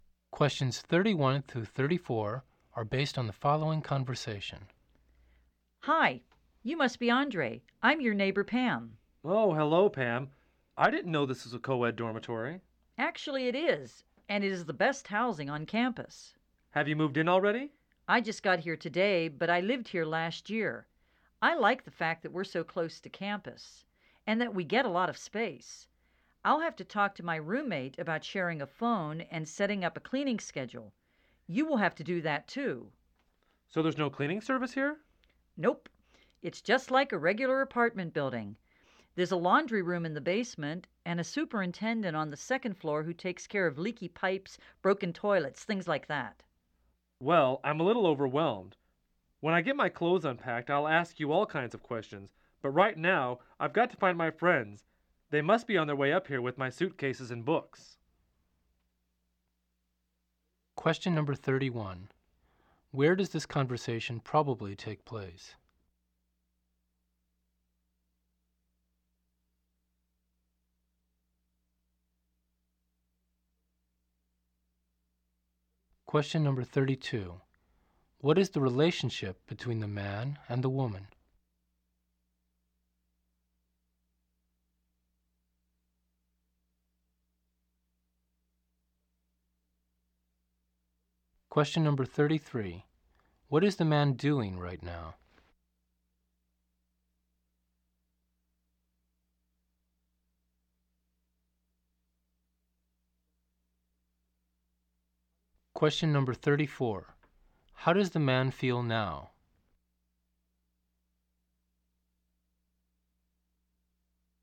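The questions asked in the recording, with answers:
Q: Where does this conversation probably take place?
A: In a campus dormitory

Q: What is the relationship between the man and the woman?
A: They are neighbors

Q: What is the man doing right now?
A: Moving into the dormitory

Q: How does the man feel now?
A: A little overwhelmed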